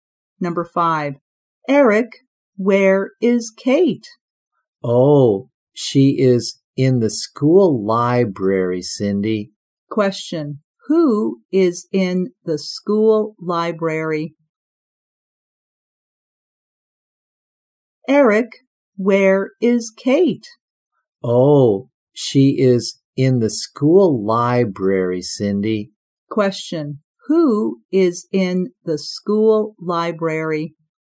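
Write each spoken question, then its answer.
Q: Question, who is in the school library?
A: Kate.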